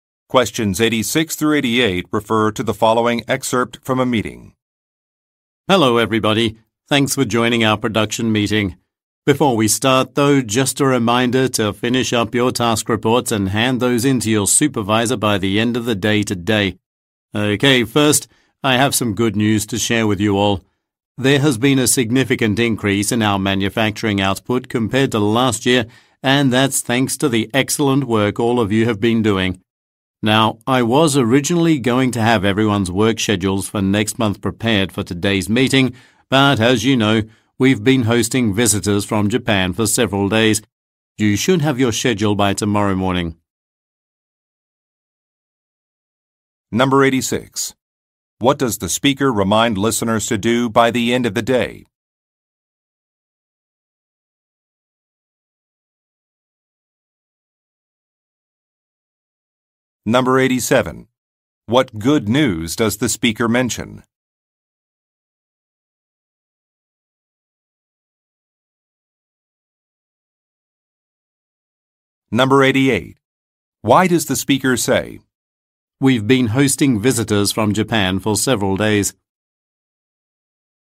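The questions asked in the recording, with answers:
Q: What does the speaker remind listeners to do by the end of the day?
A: Hand in their task reports to their supervisor

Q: What good news does the speaker mention?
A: Manufacturing output has increased significantly compared to last year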